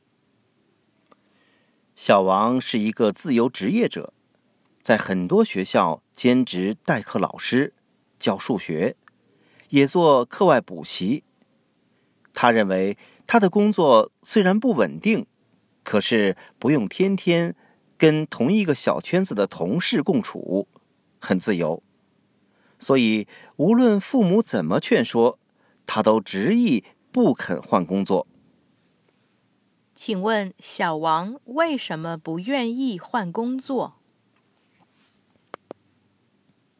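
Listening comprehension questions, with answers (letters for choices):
Listen to the audio texts and questions, tick ONE correct answer to each question.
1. Why is Xiao Wang reluctant to change his job?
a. He has more freedom at his current job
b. He has no colleagues at his current job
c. He never listens to his parents' advice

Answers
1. a

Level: Advanced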